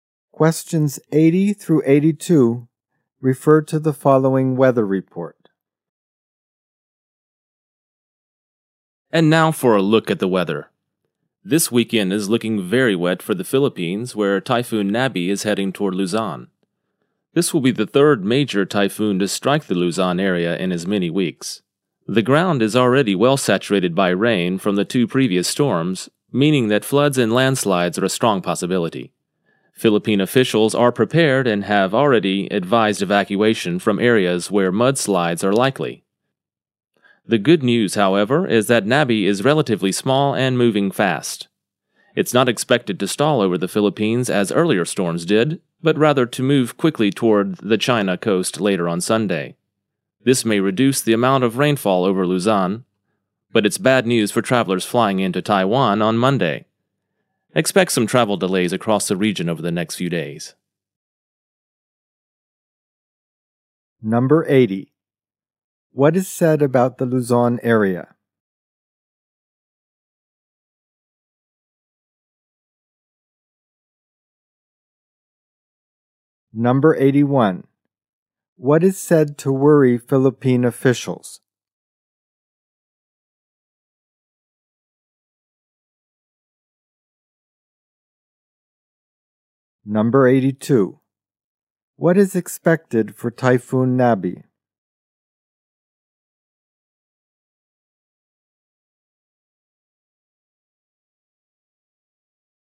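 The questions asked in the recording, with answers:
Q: What is said about the Luzon area?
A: It has been hit by two typhoons in recent weeks

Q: What is said to worry Philippine officials?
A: Floods and landslides

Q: What is expected for Typhoon Nabi?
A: It will move quickly toward the China coast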